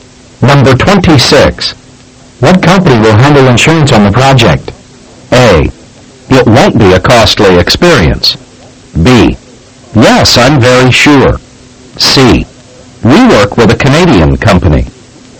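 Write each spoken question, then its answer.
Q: What company will handle insurance on the project?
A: C: We work with a Canadian company.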